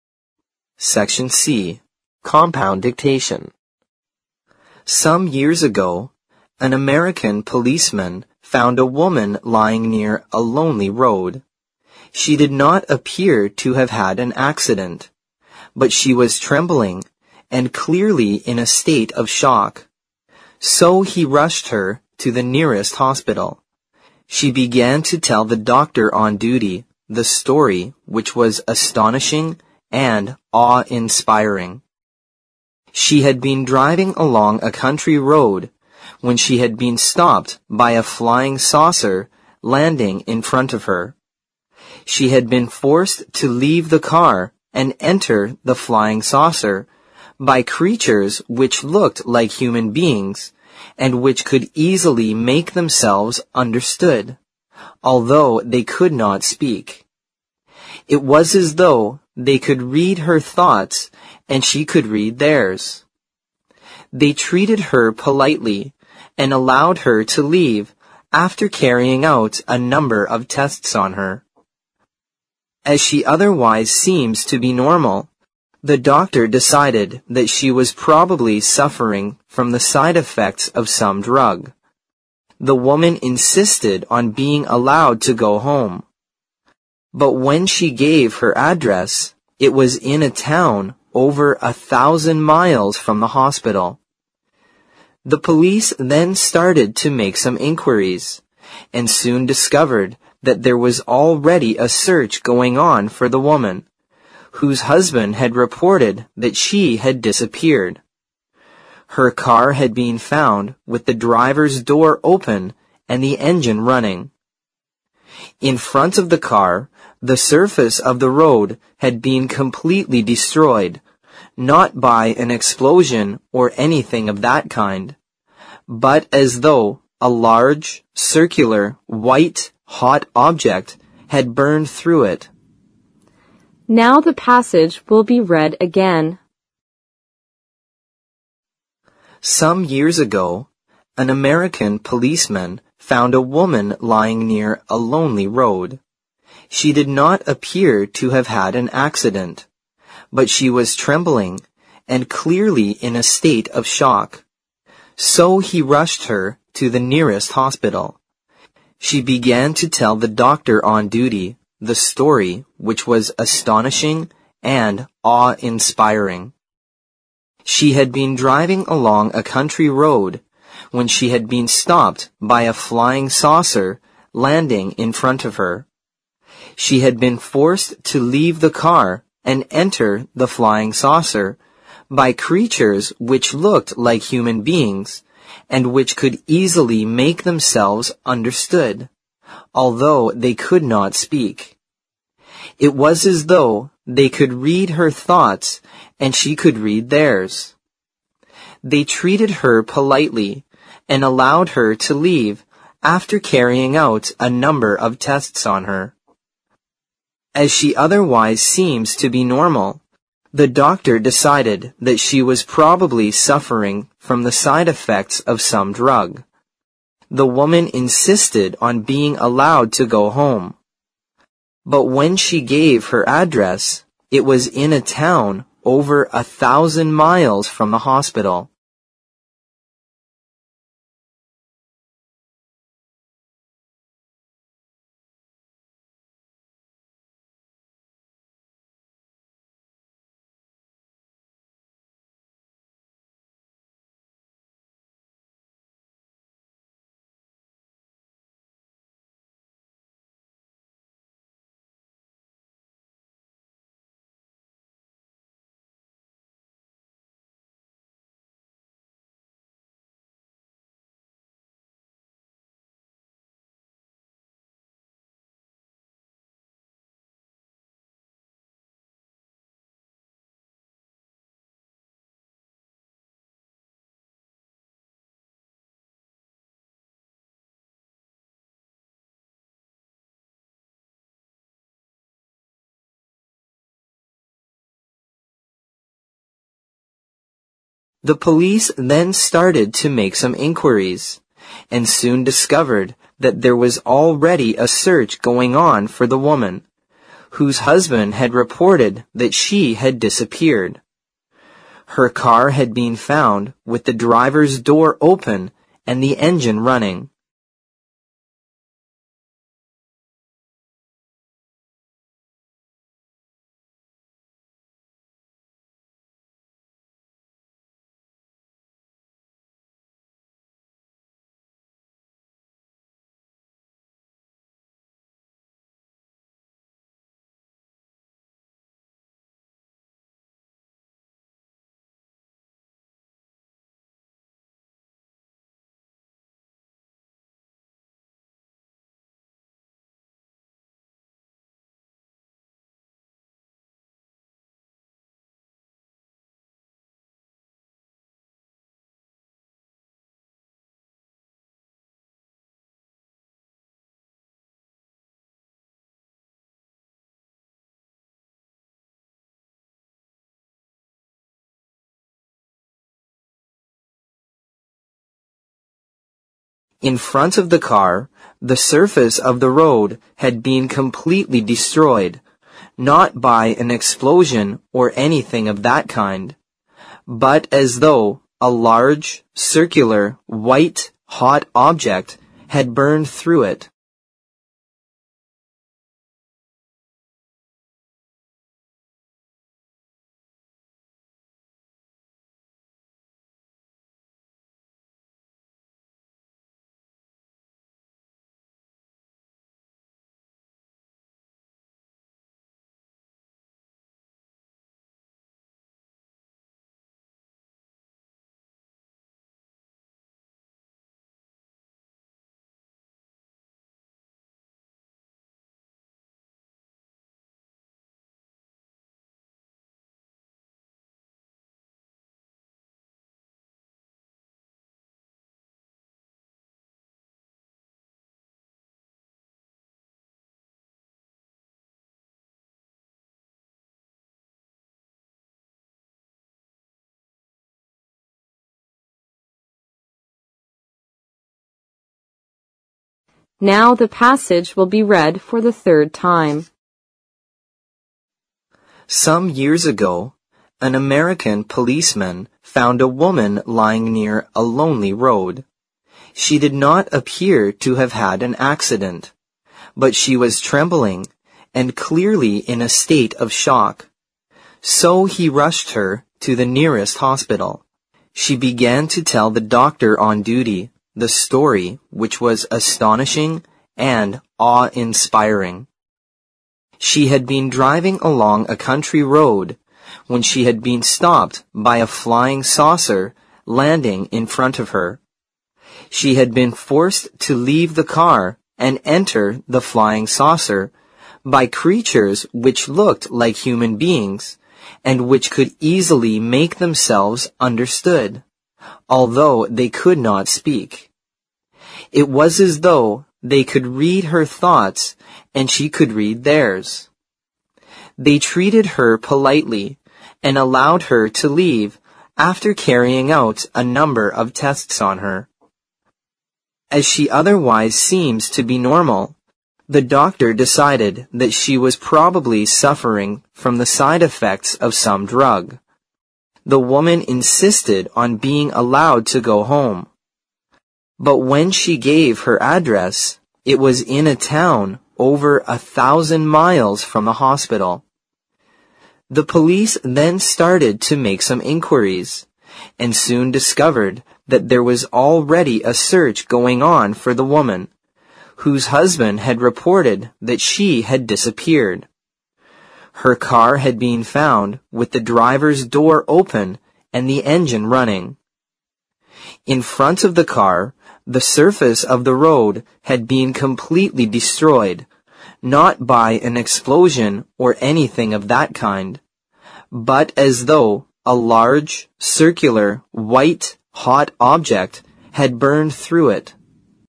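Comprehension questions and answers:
Section C Compound Dictation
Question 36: She did not appear to have had an (36) ______ .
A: accident

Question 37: So he (37) ______ her to the nearest hospital.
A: rushed

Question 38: She began to tell the doctor on duty the story which was astonishing and (38) ______ .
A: awe-inspiring

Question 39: She had been forced to leave the car and enter the flying saucer by (39) ______ which looked like human beings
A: creatures

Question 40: which could easily make themselves (40) ______ although they could not speak.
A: understood

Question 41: They (41) ______ her politely and allowed her to leave after carrying out a number of tests on her.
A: treated

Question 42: As she otherwise seems to be (42) ______ ,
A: normal

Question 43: the doctor decided that she was probably (43) ______ from the side effects of some drug.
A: suffering

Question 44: (44) __________________________________________________________ .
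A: But when she gave her address, it was in a town over 1,000 miles from the hospital

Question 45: (45) __________________________________________________ .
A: Her car had been found with the driver's door open and the engine running

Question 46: (46) ___________________________________________________ .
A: but as though a large, circular, white, hot object had burned through it

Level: 四级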